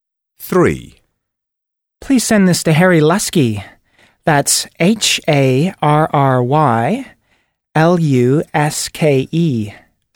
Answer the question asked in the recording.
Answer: Harry Luske